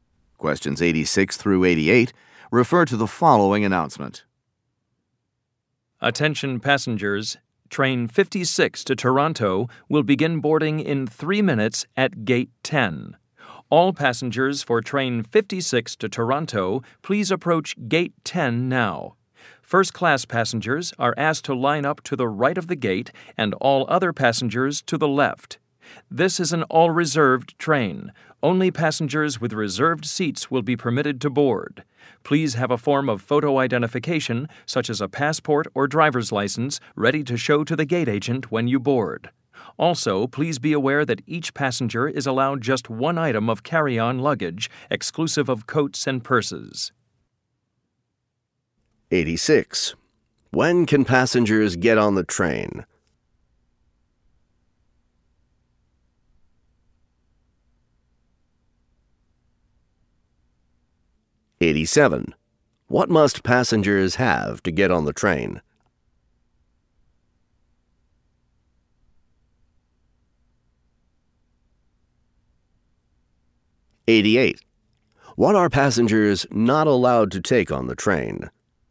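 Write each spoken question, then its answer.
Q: When can passengers get on the train?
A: In 3 minutes

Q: What must passengers have to get on the train?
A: A reserved seat and photo identification

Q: What are passengers not allowed to take on the train?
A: More than one carry-on item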